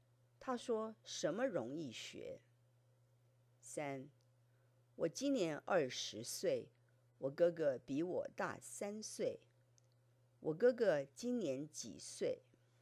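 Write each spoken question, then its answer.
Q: 我哥哥今年几岁?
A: 23岁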